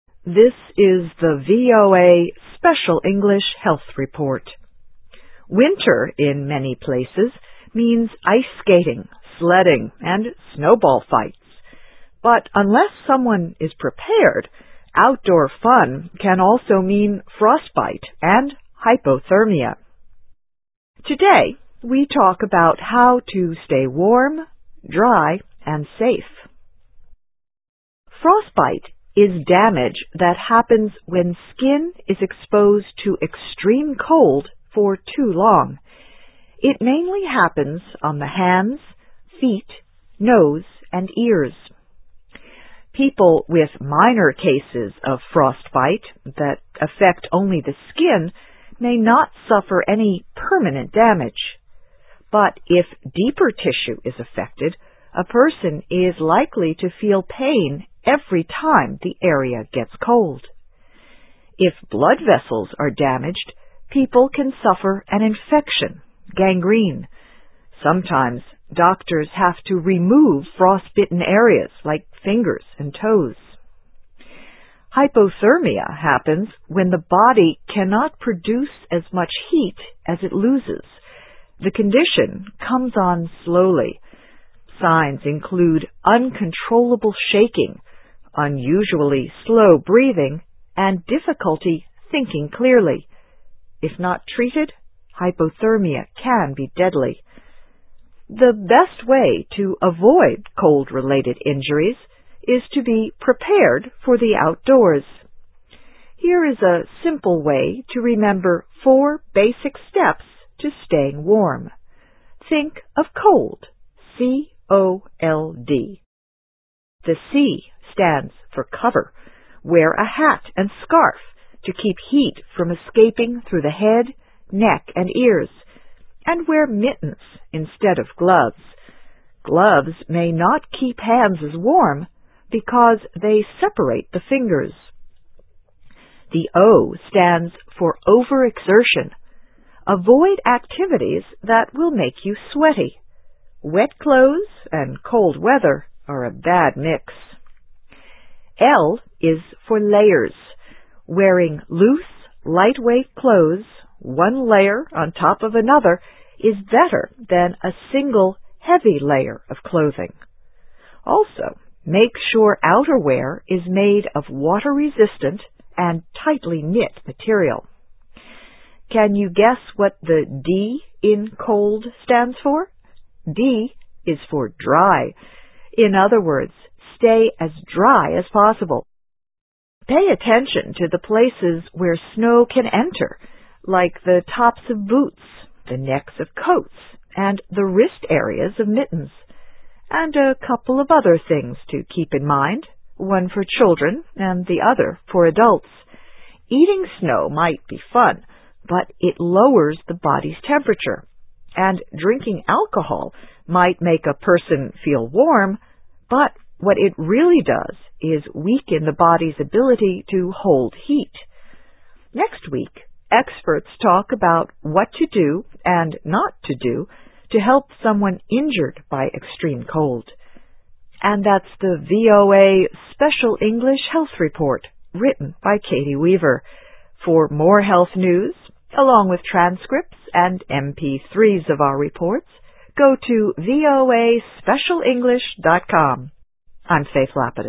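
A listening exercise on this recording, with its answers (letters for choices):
Escucha el audio y elige la opción correcta.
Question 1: Frostbite mainly happens on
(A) the legs.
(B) the lips.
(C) the ears.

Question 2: If blood vessels are damaged, people can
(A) suffer an infection.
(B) remove fingers and toes.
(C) suffer hypothermia.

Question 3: In the C.O.L.D. steps, the C stands for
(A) Cover.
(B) Cold.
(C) Caution.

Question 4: Wet clothes and cold weather are a bad mix.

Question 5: Wearing one layer on top of another is better than a single heavy layer of clothing.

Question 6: Snow can enter through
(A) the legs.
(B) the wrist areas.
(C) the arms.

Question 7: Eating snow is a good idea.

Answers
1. C
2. A
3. A
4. True.
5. True.
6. B
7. False.

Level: Nivel Principiantes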